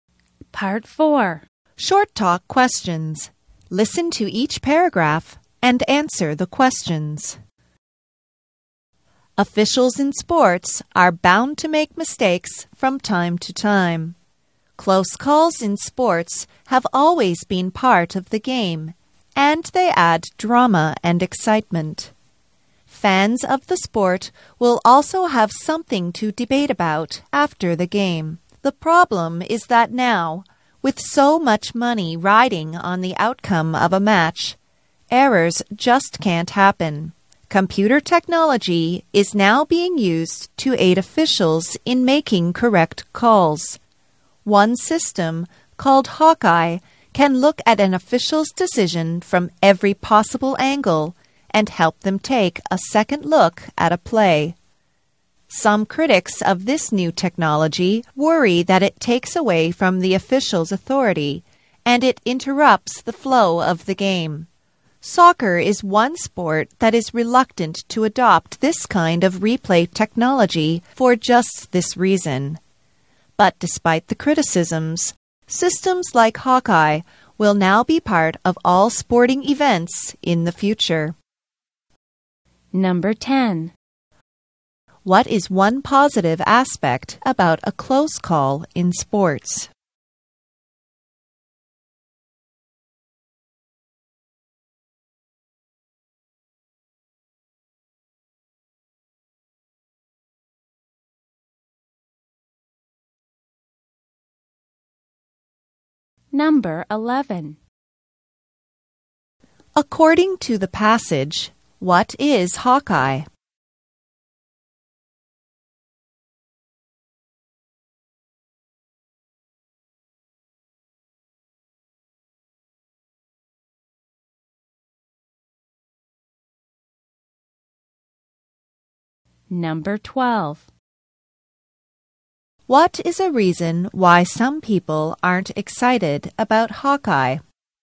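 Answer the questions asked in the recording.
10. It adds drama and excitement, and gives fans something to debate.
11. A computer system that helps officials review a play from every angle to make correct calls.
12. It takes away from the official's authority and interrupts the flow of the game.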